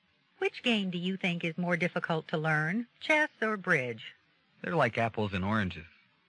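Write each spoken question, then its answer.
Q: What does the man mean?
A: The two games are too different to compare.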